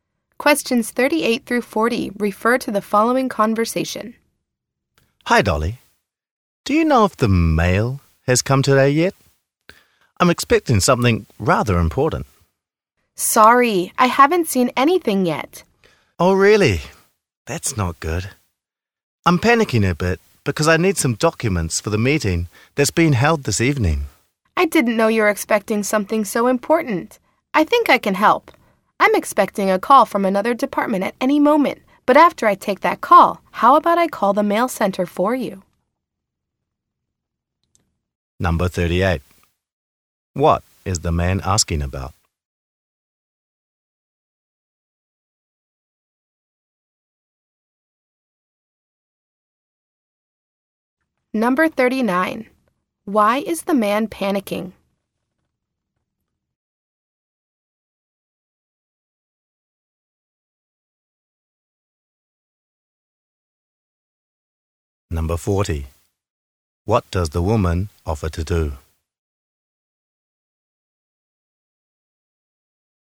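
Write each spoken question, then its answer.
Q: What is the man asking about?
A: Whether the mail has come

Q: Why is the man panicking?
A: He needs documents for this evening's meeting

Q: What does the woman offer to do?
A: Call the mail center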